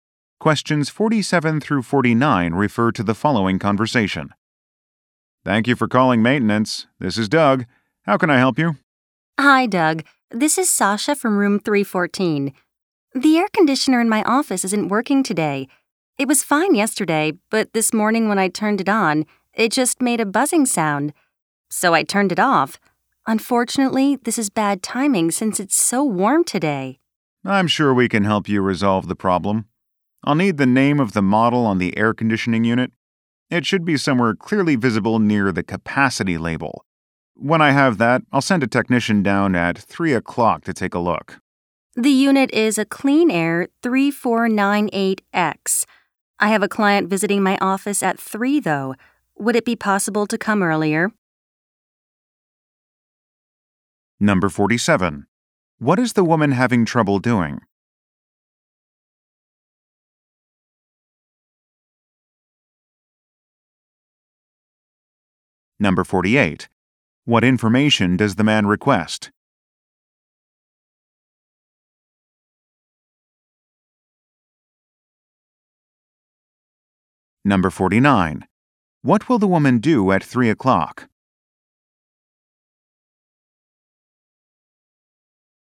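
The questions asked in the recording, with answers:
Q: What is the woman having trouble doing?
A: Using her air conditioner

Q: What information does the man request?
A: The air conditioner's model name

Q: What will the woman do at 3 o'clock?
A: Meet a client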